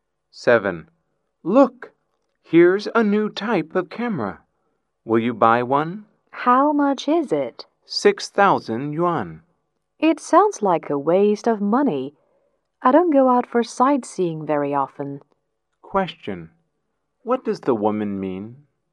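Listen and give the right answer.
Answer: The camera is too expensive, so she won't buy it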